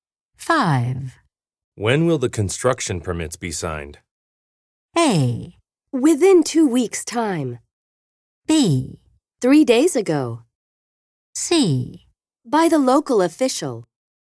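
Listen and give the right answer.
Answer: A: Within 2 weeks' time.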